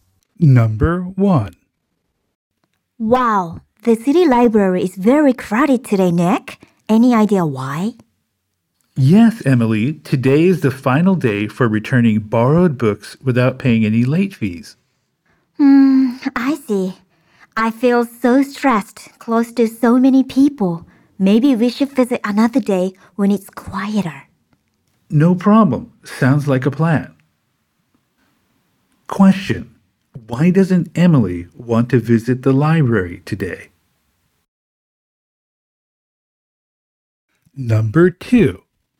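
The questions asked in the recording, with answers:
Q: Why doesn't Emily want to visit the library today?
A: Because it is crowded and she feels stressed near so many people.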